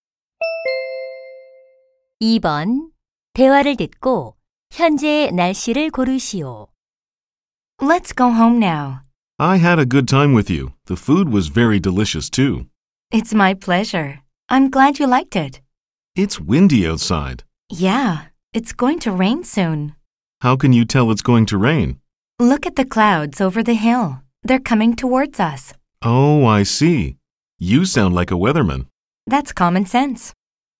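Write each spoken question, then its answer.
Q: 대화를 듣고 현재의 날씨를 고르시오.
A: 바람이 붊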